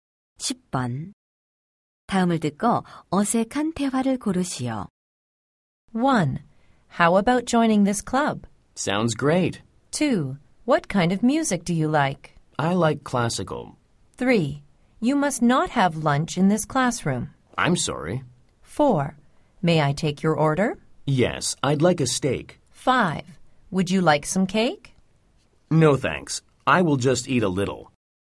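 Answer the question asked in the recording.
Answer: 5: Would you like some cake? No, thanks. I will just eat a little.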